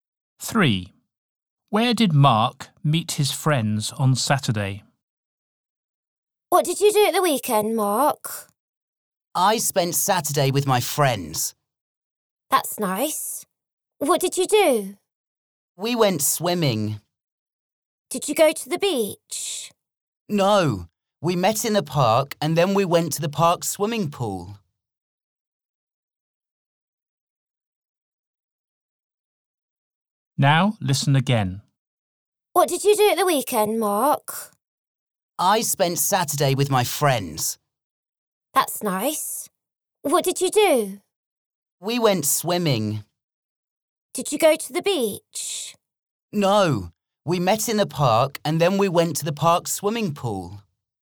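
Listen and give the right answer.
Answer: In the park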